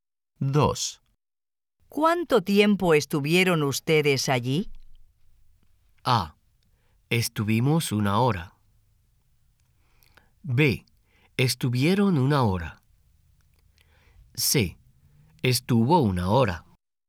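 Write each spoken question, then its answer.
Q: ¿Cuánto tiempo estuvieron ustedes allí?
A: A: Estuvimos una hora.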